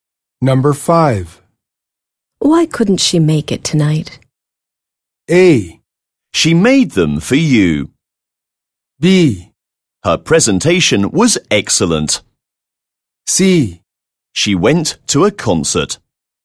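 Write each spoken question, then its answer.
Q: Why couldn't she make it tonight?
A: C: She went to a concert.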